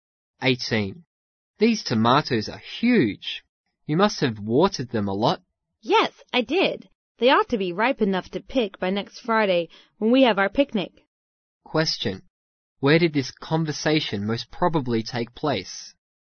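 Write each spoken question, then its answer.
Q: Question, where did this conversation most probably take place?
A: In a garden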